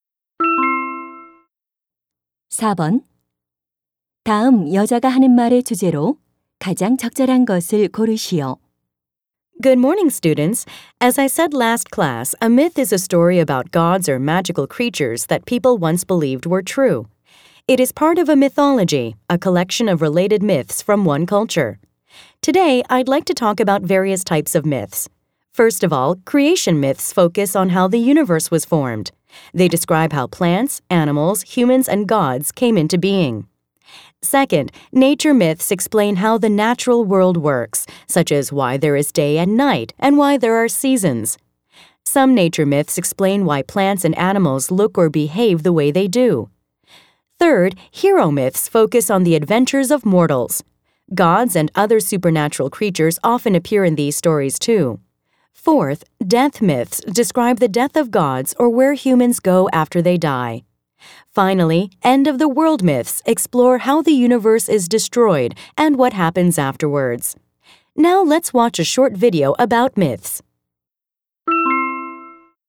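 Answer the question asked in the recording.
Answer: 신화의 다양한 유형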